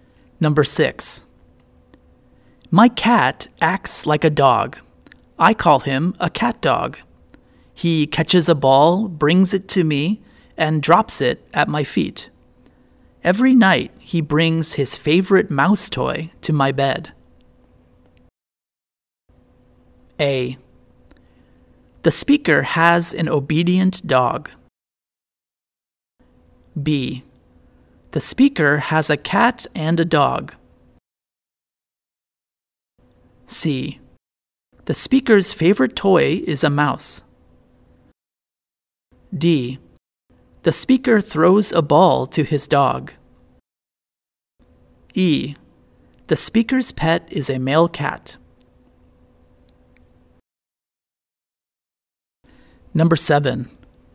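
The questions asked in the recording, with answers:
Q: My cat acts like a dog.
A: E: The speaker's pet is a male cat.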